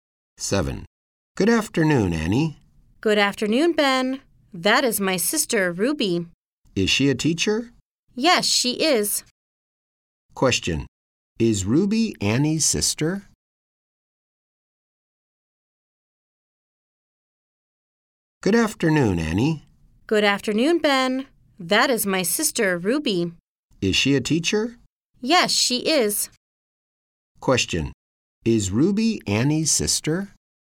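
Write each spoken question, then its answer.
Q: Is Ruby Annie's sister?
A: Yes, she is.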